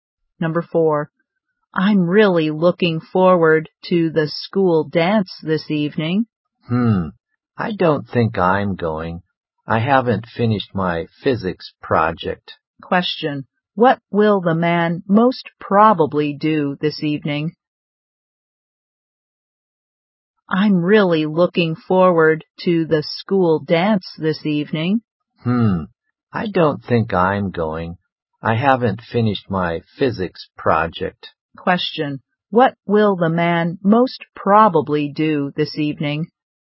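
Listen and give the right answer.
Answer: Work on his physics project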